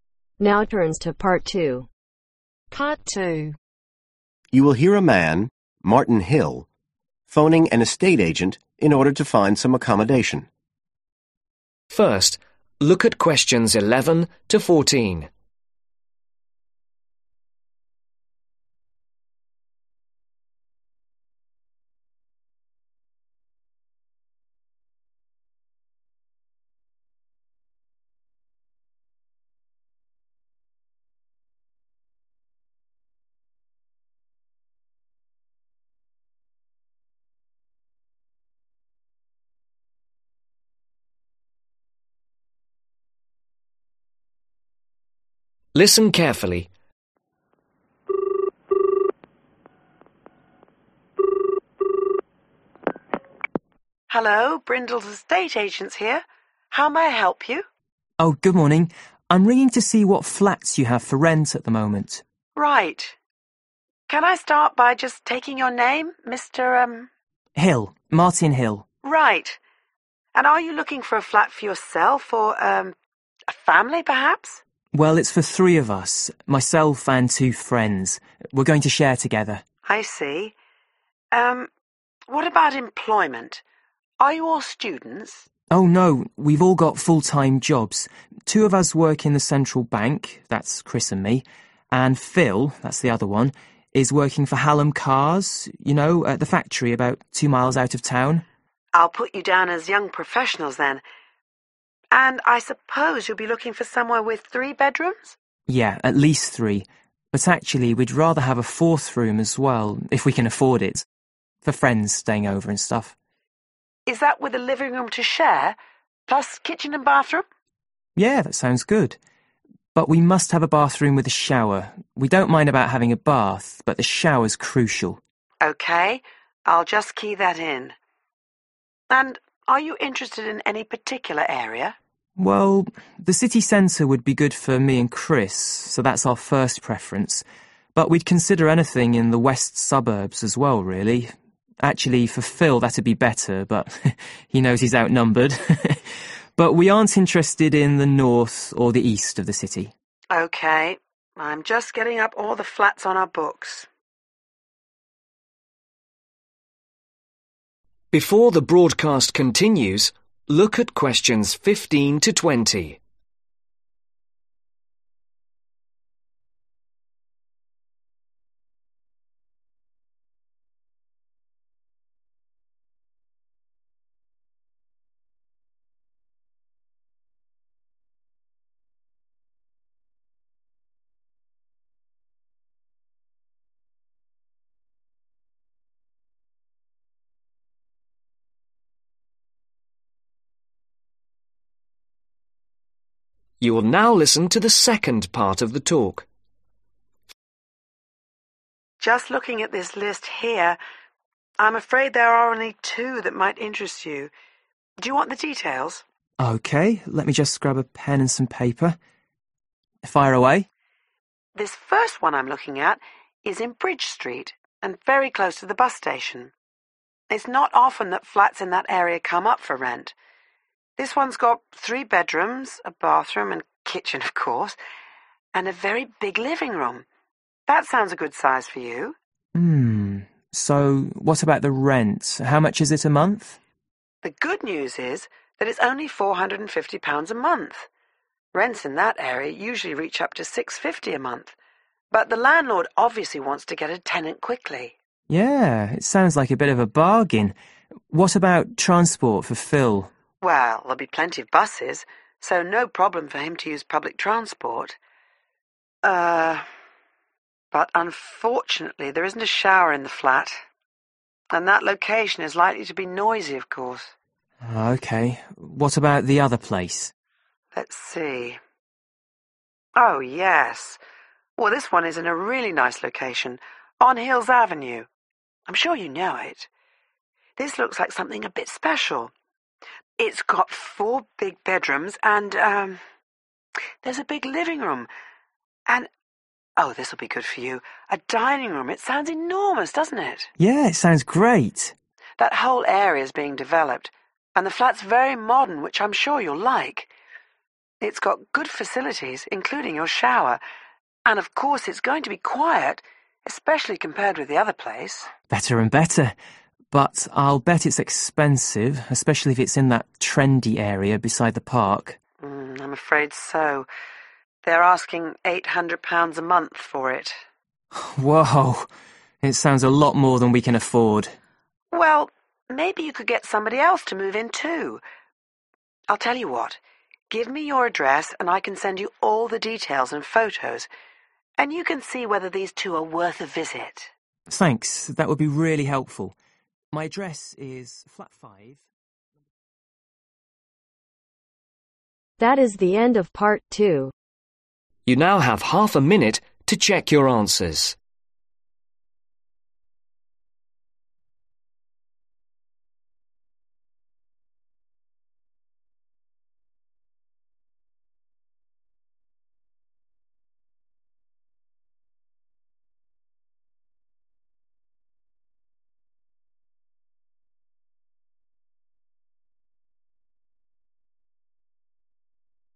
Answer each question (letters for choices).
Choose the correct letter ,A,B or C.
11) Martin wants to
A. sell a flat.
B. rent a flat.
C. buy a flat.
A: B

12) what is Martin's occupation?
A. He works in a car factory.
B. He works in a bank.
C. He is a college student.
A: B

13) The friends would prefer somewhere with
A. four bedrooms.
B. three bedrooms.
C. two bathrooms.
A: A

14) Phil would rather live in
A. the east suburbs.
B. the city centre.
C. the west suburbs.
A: C

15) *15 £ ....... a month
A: £450

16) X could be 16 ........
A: Noisy

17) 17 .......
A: Hills avenue

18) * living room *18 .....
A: Dining Room

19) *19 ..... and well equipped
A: (Very) Modern

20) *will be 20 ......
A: Quiet